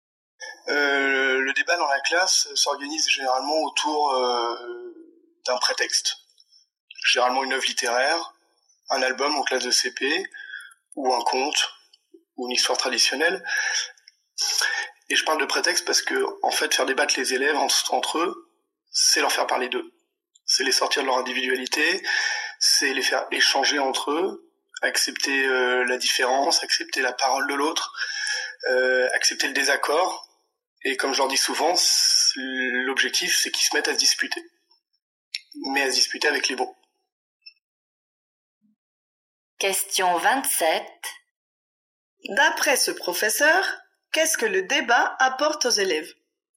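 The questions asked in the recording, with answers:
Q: D'après ce professeur, qu'est-ce que le débat apporte aux élèves ?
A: Ils apprennent à échanger et à accepter la parole et le désaccord des autres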